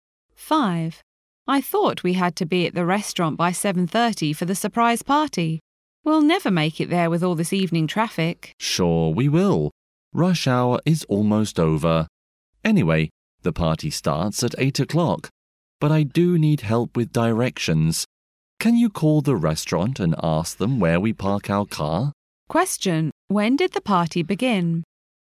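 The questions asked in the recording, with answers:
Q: When did the party begin?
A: At 8 o'clock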